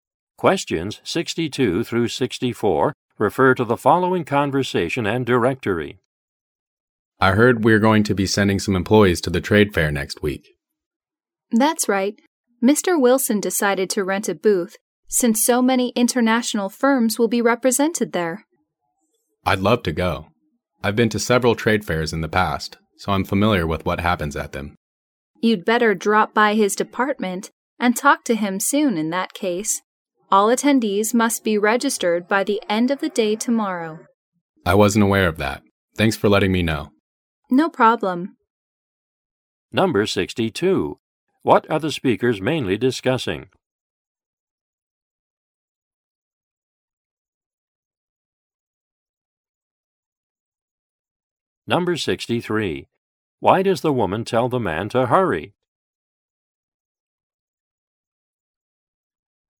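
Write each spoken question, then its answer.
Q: What are the speakers mainly discussing?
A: Going to a trade fair

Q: Why does the woman tell the man to hurry?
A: Attendees must register by the end of tomorrow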